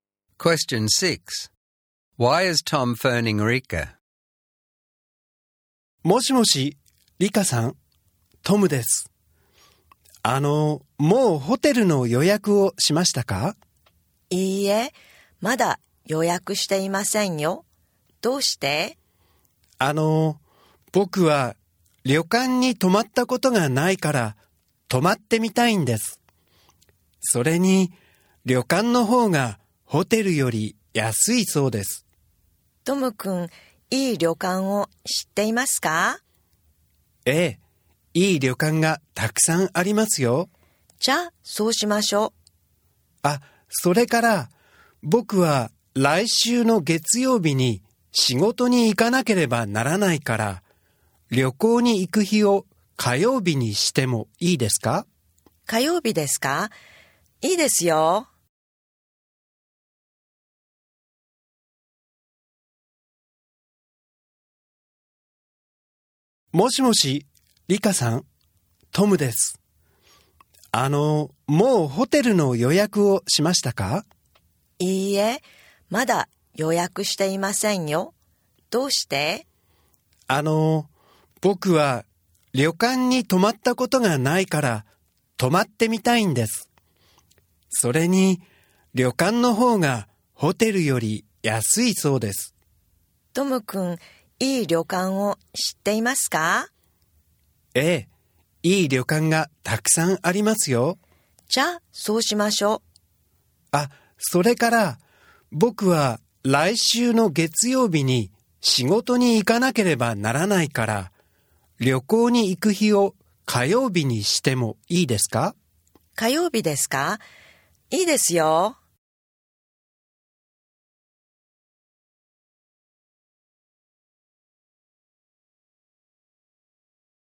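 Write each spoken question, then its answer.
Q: Why is Tom phoning Rika?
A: To suggest staying at a cheaper ryokan instead of a hotel, and to move the trip to Tuesday because he has to work on Monday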